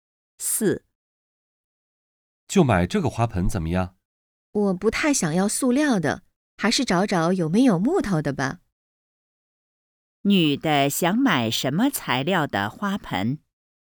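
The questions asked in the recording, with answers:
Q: 女的想买什么材料的花盆?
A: 木头的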